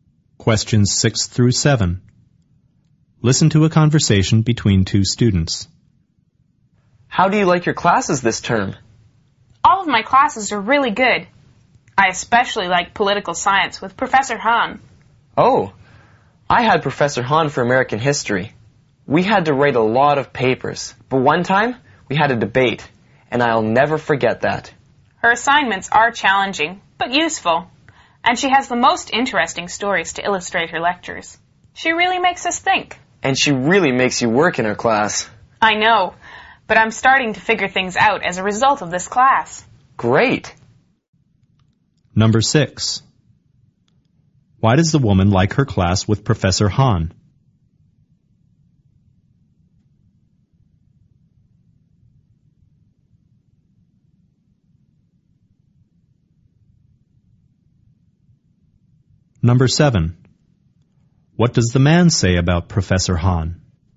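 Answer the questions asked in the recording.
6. Her assignments are challenging but useful and her stories are interesting
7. She makes students work hard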